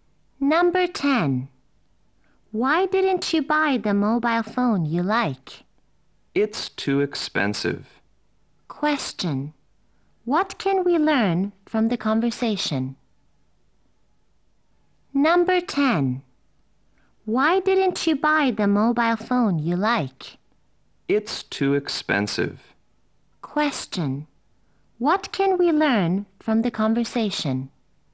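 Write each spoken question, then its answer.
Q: What can we learn from the conversation?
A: The mobile phone was too expensive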